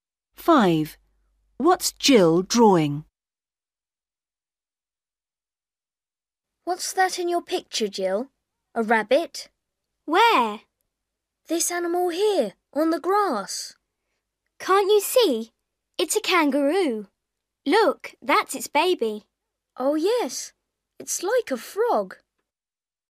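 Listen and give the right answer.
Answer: a kangaroo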